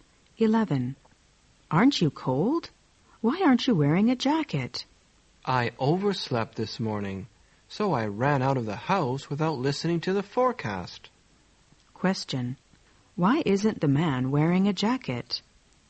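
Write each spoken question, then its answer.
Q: Why isn't the man wearing a jacket?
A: He overslept and didn't hear the forecast.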